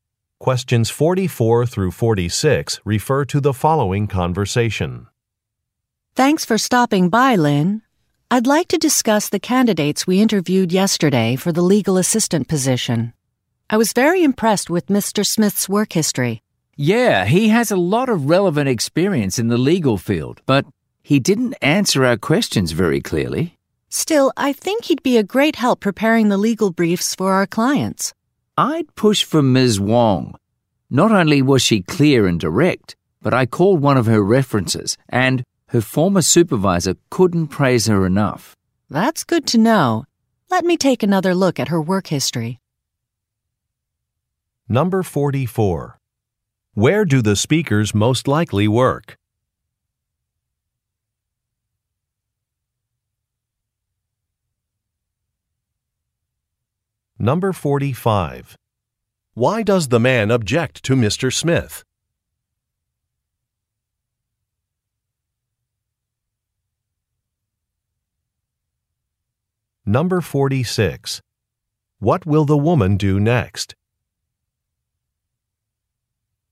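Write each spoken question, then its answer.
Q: Where do the speakers most likely work?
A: At a law firm

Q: Why does the man object to Mr.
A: He didn't answer questions clearly

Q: Number 46. What will the woman do next?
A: Review Ms. Wong's work history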